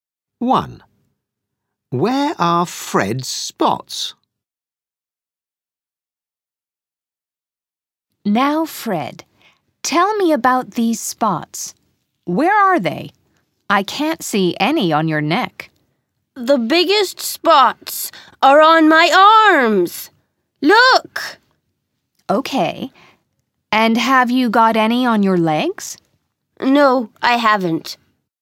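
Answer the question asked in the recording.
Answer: on his arms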